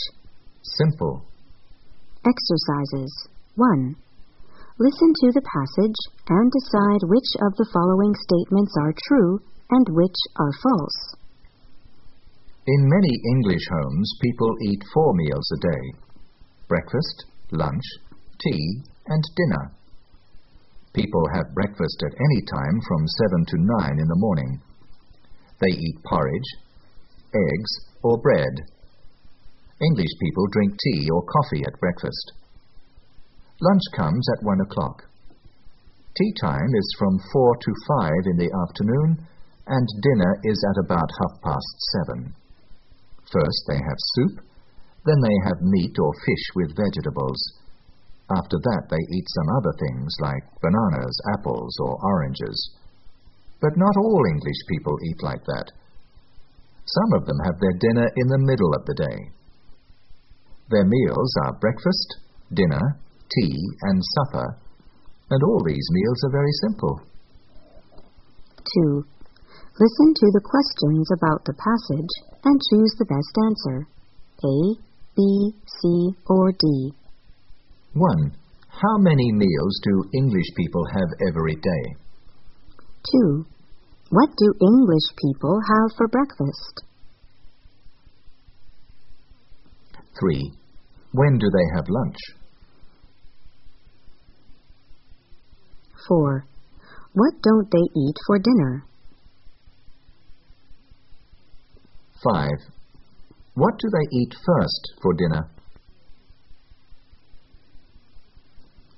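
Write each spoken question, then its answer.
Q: How many meals do English people have every day?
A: Four (in many homes)

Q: What do English people have for breakfast?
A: Porridge, eggs, or bread, with tea or coffee

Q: When do they have lunch?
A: At 1 o'clock

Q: What do they eat first for dinner?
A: Soup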